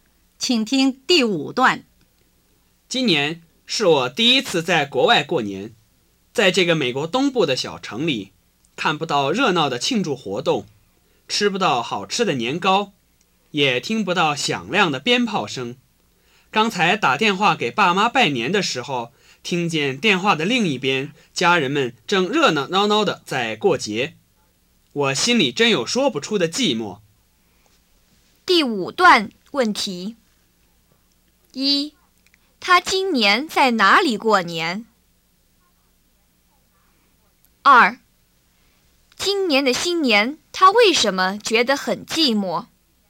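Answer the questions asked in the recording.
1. 美国东部的一个小城
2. 在国外没有热闹的庆祝活动、年糕和鞭炮,听到家人热闹过节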